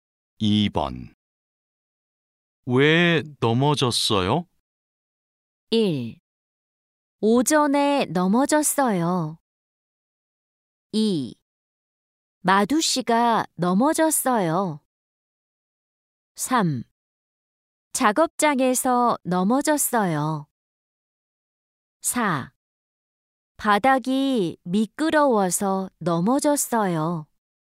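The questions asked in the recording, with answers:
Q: 왜 넘어졌어요?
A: 4: 바닥이 미끄러워서 넘어졌어요.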